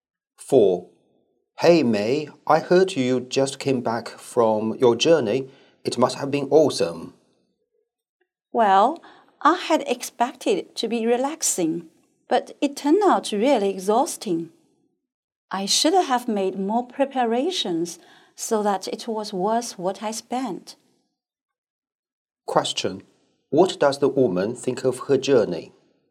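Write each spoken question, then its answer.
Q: What does the woman think of her journey?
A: It was exhausting and not worth the money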